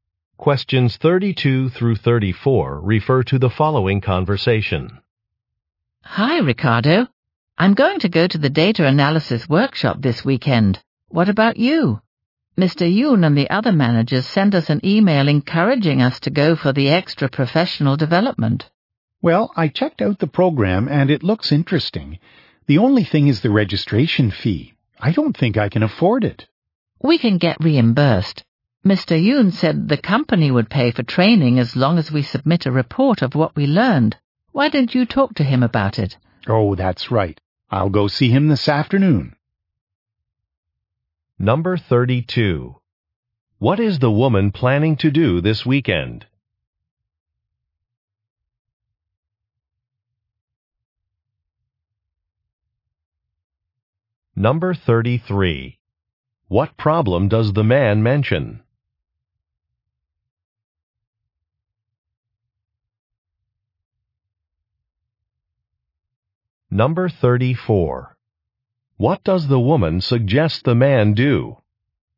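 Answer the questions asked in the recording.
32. Go to a data analysis workshop
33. He can't afford the registration fee
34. Talk to Mr. Yoon about reimbursement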